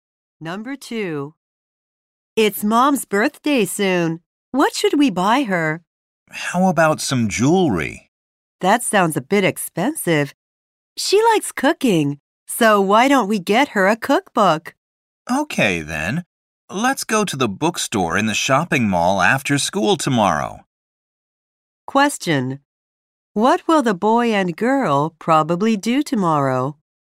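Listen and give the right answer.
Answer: Go to the bookstore to buy their mom a cookbook.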